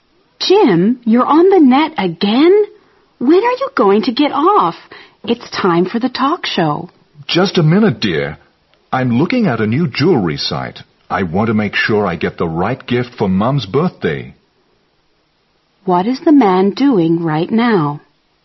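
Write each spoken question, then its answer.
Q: What is the man doing right now?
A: Looking at a jewelry website for his mom's birthday gift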